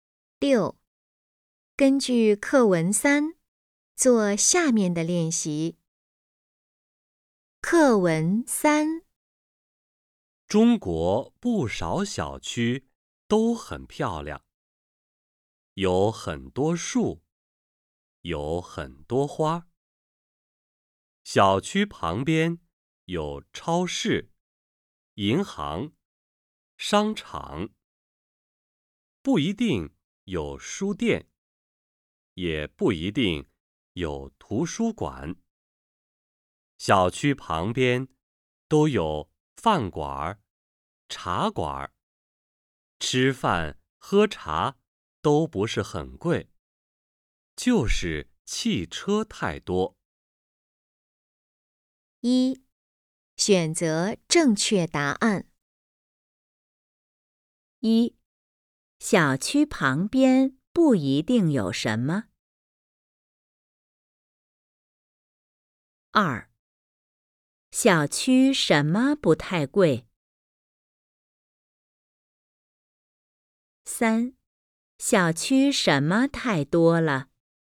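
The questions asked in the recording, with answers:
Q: 小区旁边不一定有什么。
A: 书店、图书馆

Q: 小区什么不太贵。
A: 吃饭喝茶

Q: 小区什么太多了。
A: 汽车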